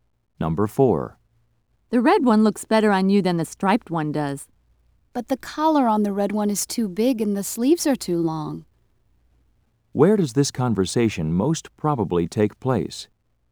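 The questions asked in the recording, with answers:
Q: Where does this conversation most probably take place?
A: In a clothing store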